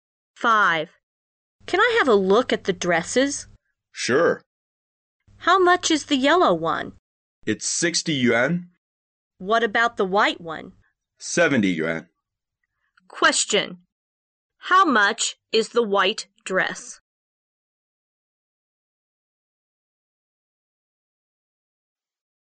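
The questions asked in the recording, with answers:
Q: How much is the white dress?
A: 70 yuan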